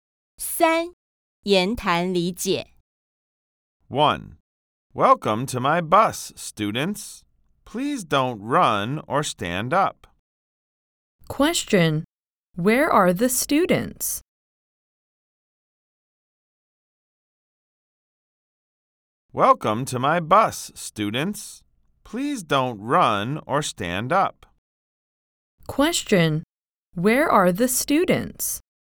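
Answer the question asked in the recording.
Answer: On the bus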